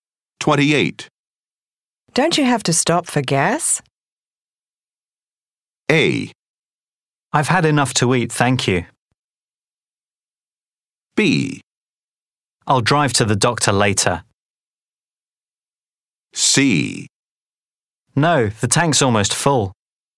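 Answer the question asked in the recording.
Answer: C: No, the tank's almost full.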